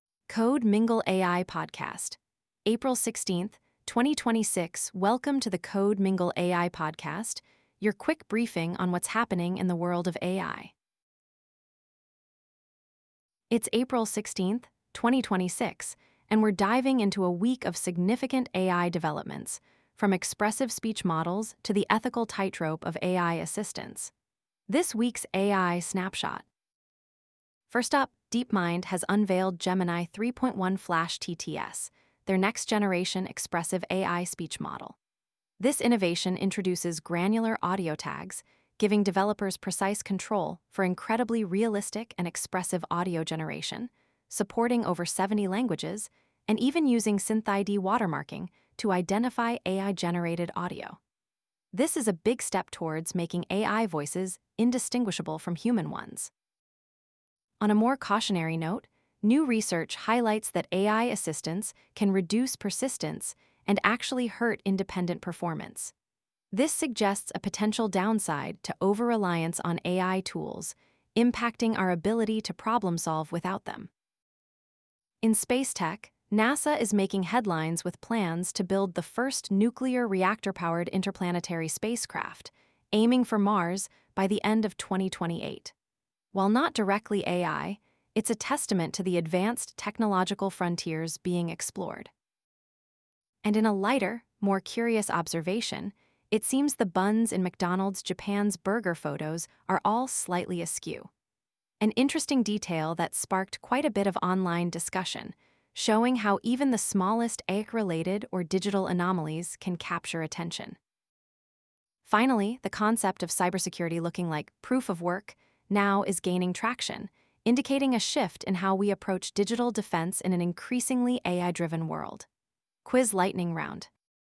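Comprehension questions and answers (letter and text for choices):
Which company, model, or tool fits the blank in this statement from the briefing: "____ is building the first nuclear reactor-powered interplanetary spacecraft."?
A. Japan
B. Points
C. NASA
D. McDonald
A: C. NASA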